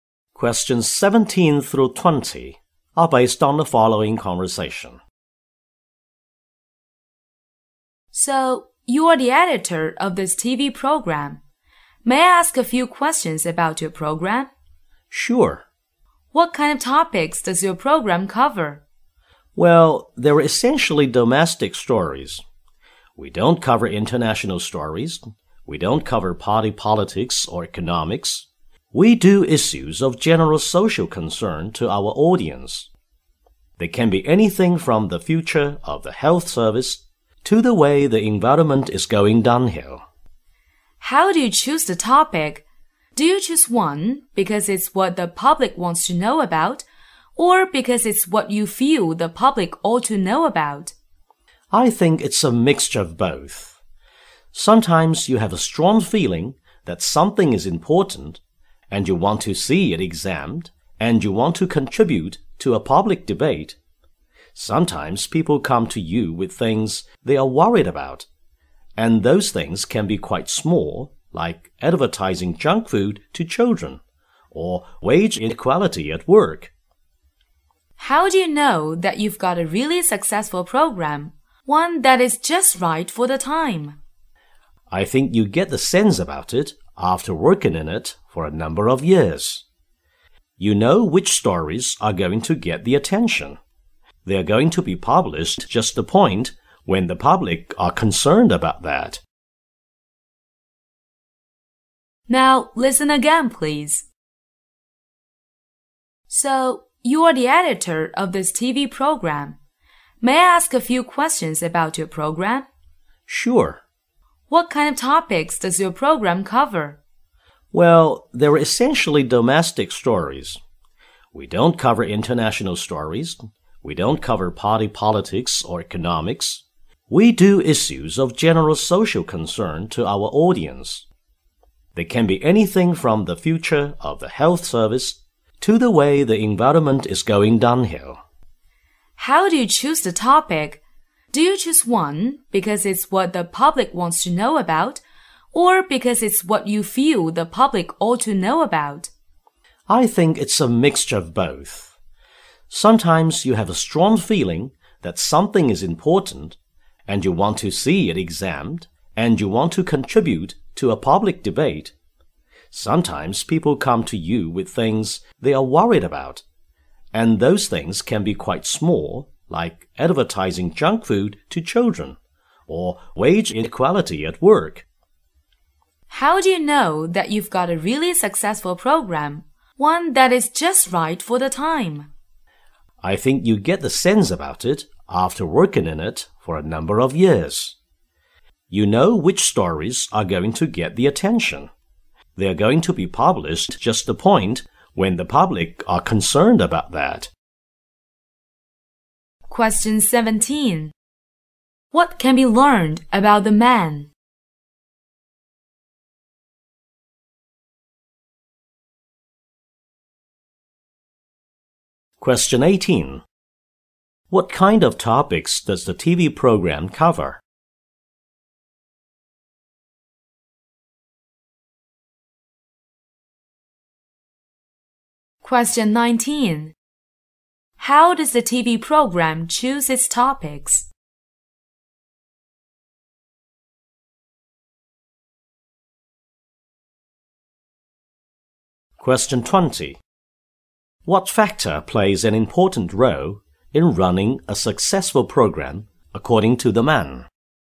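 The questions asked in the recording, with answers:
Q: What can be learned about the man?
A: He is the editor of a TV program

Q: What kind of topics does the TV program cover?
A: Domestic issues of general social concern

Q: How does the TV program choose its topics?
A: A mixture of what the public wants to know and what they think the public ought to know

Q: What factor plays an important role in running a successful program, according to the man?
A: Years of working experience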